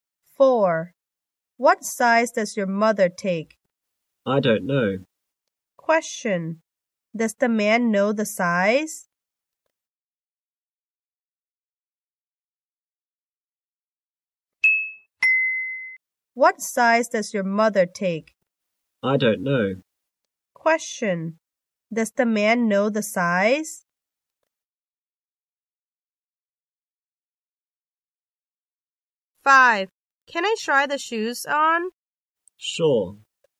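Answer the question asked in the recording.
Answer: No, he doesn't.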